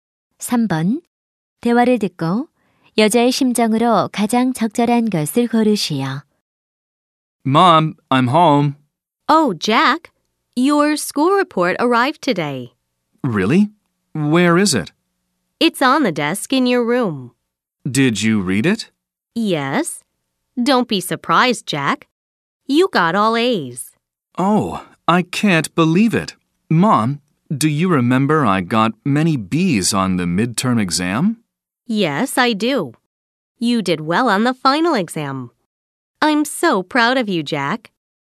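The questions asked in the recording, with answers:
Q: 대화를 듣고 여자의 심정으로 가장 적절한 것을 고르시오.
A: 자랑스러움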